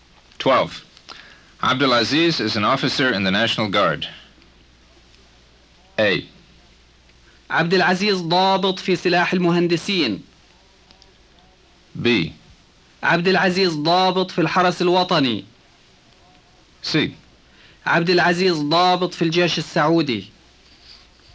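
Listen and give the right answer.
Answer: B: عبدالعزيز ضابط في الحرس الوطني.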